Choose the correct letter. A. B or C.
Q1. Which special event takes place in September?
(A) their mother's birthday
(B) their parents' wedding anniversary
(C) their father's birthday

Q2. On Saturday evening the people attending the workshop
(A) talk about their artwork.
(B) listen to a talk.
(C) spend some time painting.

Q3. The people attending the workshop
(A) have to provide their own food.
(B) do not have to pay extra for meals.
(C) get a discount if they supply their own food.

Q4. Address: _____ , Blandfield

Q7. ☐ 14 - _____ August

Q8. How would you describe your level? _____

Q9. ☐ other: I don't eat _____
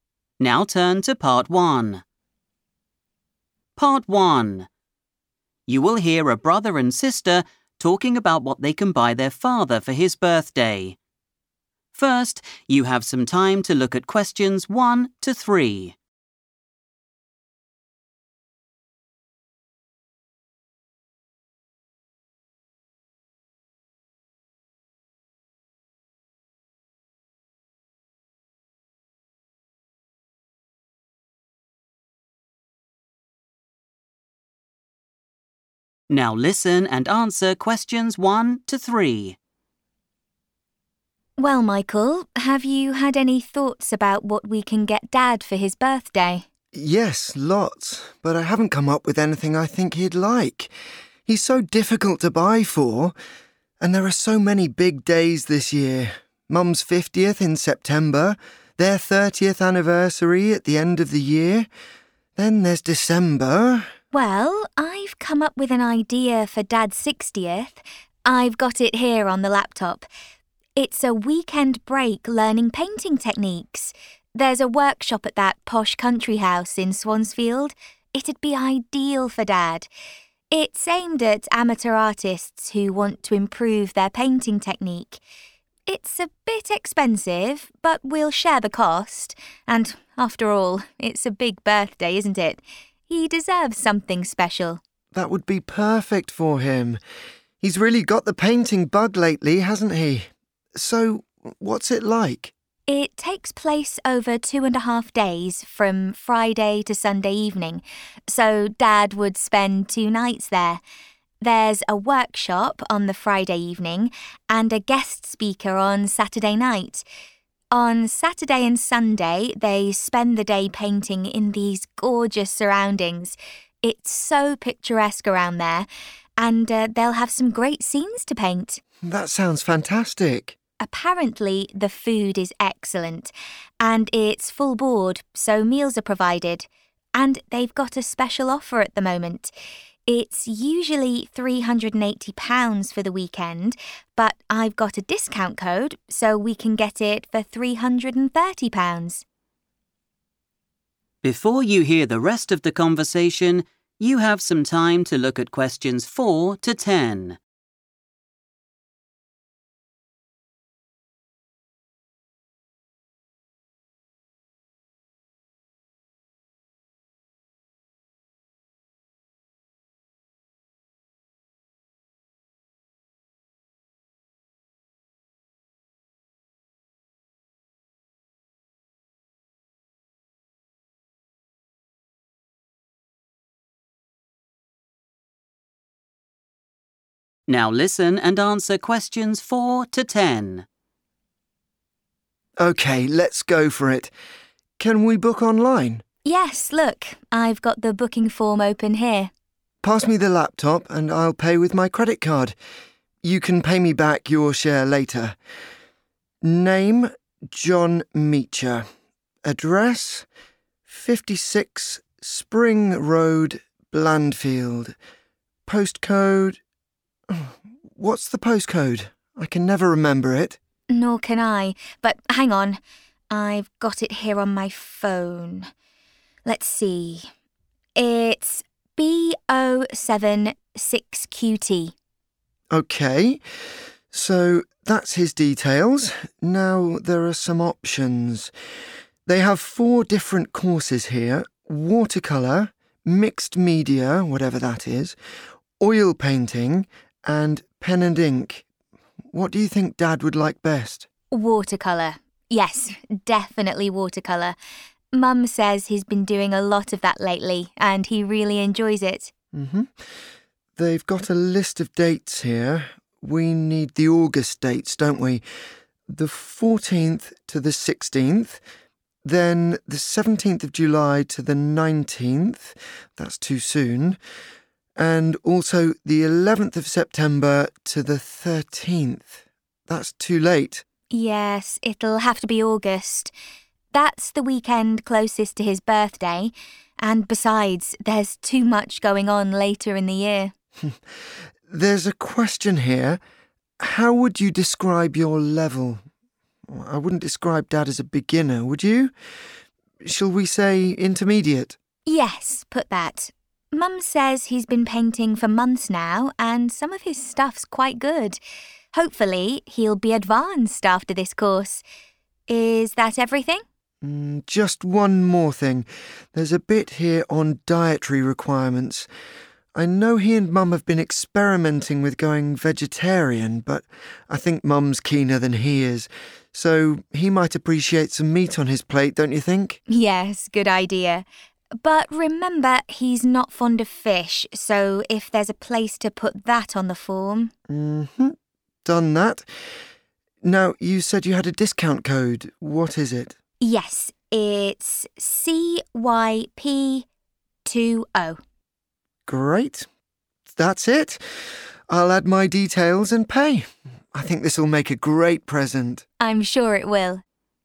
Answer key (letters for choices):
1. A
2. B
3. B
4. 56 Spring Road
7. 16
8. intermediate
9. fish

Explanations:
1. The correct answer is 'their mother's birthday' because Michael explicitly lists 'Mum's fiftieth' as an event occurring in September. In this context, 'fiftieth' refers to her 50th birthday. He contrasts this with the parents' wedding anniversary, which is at the end of the year, and their father's birthday, which is in August.
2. The correct answer is B because Teresa explains the plan for the weekend. She mentions that while the artists paint during the day on Saturday, there is a 'guest speaker' on Saturday night. A speaker is a person who gives a speech or a 'talk' to an audience.
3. The correct answer is B because Teresa explains that the painting break is 'full board.' In the travel and hotel industry, 'full board' means that the price you pay includes your room and all your meals. Because the meals are already provided, the people attending do not need to pay extra for them.
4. The correct answer is 56 Spring Road because Michael says this address out loud while he is typing the information into the booking form on his computer. He mentions this street name right before saying the name of the town, Blandfield.
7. The correct answer is 14-16 because Michael looks at the list of available dates on the computer. He mentions that the August session goes from the 14th to the 16th. Since they want a weekend in August for their father's birthday, they chose these specific dates.
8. The correct answer is 'intermediate' because Michael sees the question on the form asking for the painting level. He remarks that their father is not a beginner (someone with no experience) and suggests choosing 'intermediate,' to which Teresa agrees by saying, 'Yes, put that.'
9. The correct answer is "fish" because while Michael and Teresa are filling out the booking form, they discuss John's food preferences. Teresa mentions that John is not "fond of" (which means he does not like) fish. This information is needed for the "dietary requirements" section where they list items he doesn't eat.

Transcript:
Teresa: Well, Michael, have you had any thoughts about what we can get Dad for his birthday?
Michael: Yes, lots, but I haven't come up with anything I think he'd like. He's so difficult to buy for! And there are so many big days this year: Mum's fiftieth in September, their thirtieth anniversary at the end of the year, then there's December ...
Teresa: Well, I've come up with an idea for Dad's sixtieth. I've got it here on the laptop. It's a weekend break learning painting techniques. There's a workshop at that posh country house in Swansfield. It'd be ideal for Dad. It's aimed at amateur artists who want to improve their painting technique. It's a bit expensive but we'll share the cost and after all, it's a big birthday, isn't it? He deserves something special.
Michael: That would be perfect for him. He's really got the painting bug lately, hasn't he? So, what's it like?
Teresa: It takes place over two and a half days, from Friday to Sunday evening so Dad would spend two nights there. There's a workshop on the Friday evening and a guest speaker on Saturday night. On Saturday and Sunday, they spend the day painting in these gorgeous surroundings. It's so picturesque around there and they'll have some great scenes to paint.
Michael: That sounds fantastic.
Teresa: Apparently, the food is excellent, and it's full board so meals are provided, and they've got a special offer at the moment. It's usually £380 for the weekend but I've got a discount code so we can get it for £330.
Michael: OK, let's go for it. Can we book online?
Teresa: Yes, look, I've got the booking form open here.
Michael: Pass me the laptop and I'll pay with my credit card. You can pay me back your share later. Name, John Meacher. Address, 56 Spring Road, Blandfield. Postcode ... What's the postcode? I can never remember it.
Teresa: Nor can I, but hang on.
So, that's his details. Now there are some options. They have four different courses here: watercolour, mixed media – whatever that is, oil painting and pen and ink. What do you think Dad would like best?
Teresa: Watercolour. Yes, definitely watercolour. Mum says he's been doing a lot of that lately and he really enjoys it.
Michael: They've got a list of dates here. We need the August dates, don't we? The 14th to the 16th, then the 17th of July to the 19th - that's too soon, and also the 11th of September to the 13th – that's too late.
Teresa: Yes, it'll have to be August. That's the weekend closest to his birthday and besides, there's too much going on later in the year.
Michael: There's a question here: 'How would you describe your level?' I wouldn't describe Dad as a beginner, would you? Shall we say intermediate?
Teresa: Yes, put that. Mum says he's been painting for months now and some of his stuffs quite good. Hopefully, he'll be advanced after this course! Is that everything?
Michael: Just one more thing. There's a bit here on dietary requirements. I know he and Mum have been experimenting with going vegetarian but I think Mum's keener than he is, so he might appreciate some meat on his plate, don't you think?
Teresa: Yes, good idea. But remember, he's not fond of fish so if there's a place to put that on the form ...
Michael: Done that. Now, you said you had a discount code. What is it?
Teresa: Yes, it's CYP20.
Michael: Great, that's it. I'll add my details and pay.